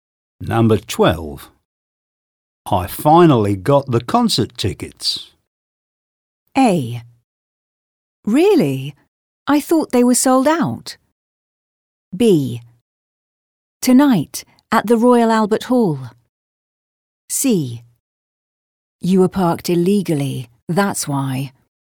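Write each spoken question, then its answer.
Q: I finally got the concert tickets.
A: A: Really? I thought they were sold out.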